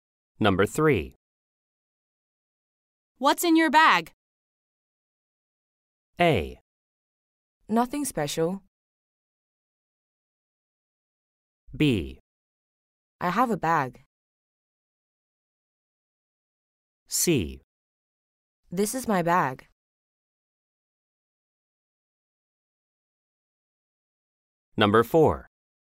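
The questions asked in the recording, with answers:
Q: What's in your bag?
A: A: Nothing special.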